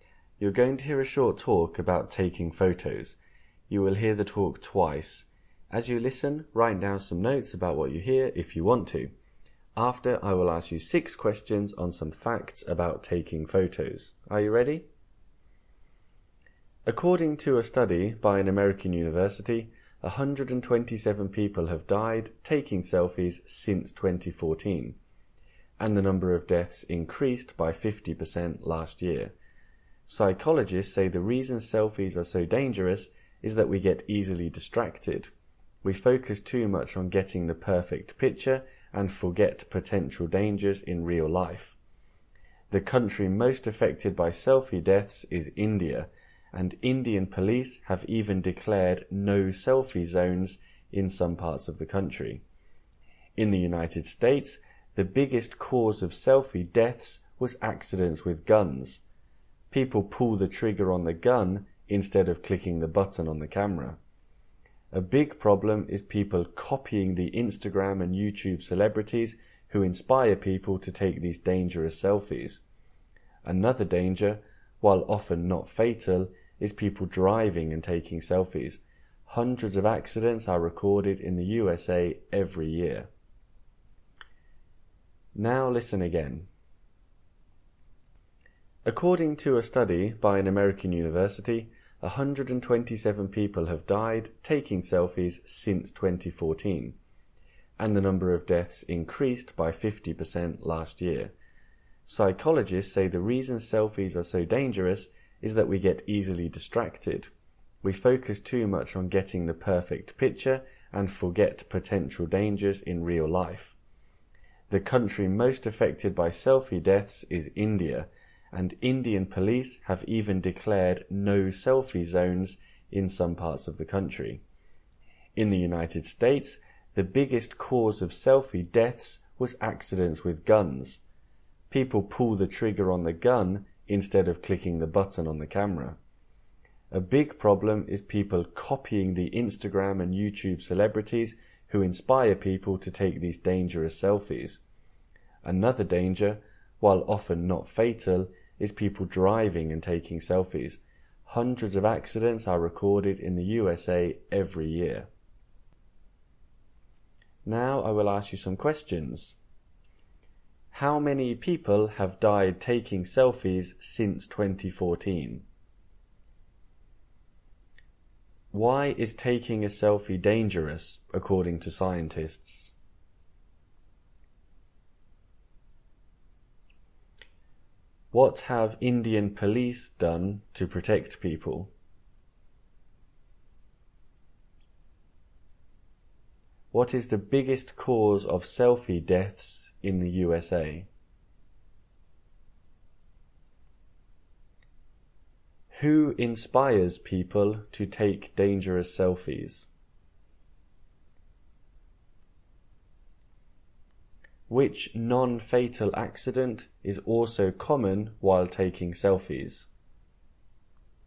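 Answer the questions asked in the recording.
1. 127
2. We get easily distracted
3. Declared no selfie zones
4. Accidents with guns
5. Instagram and YouTube celebrities
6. Driving accidents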